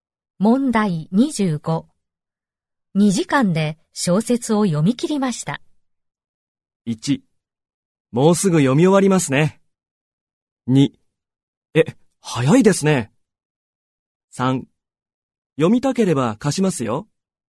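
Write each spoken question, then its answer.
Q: 2時間で小説を読み切りました。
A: 2: え、早いですね。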